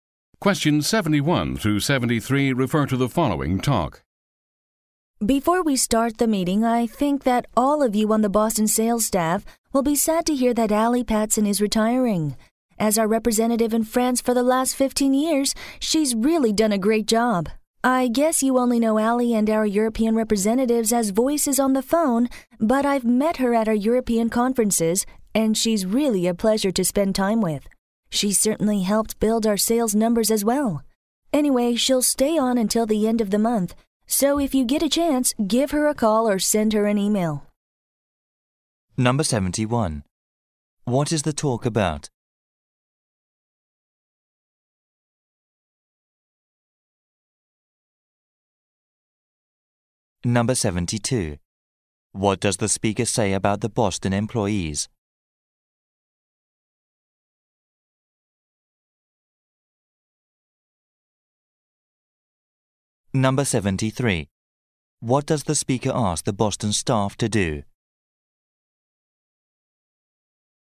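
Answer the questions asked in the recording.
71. Allie Patson's retirement
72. They only know Allie as a voice on the phone
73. Call or email Allie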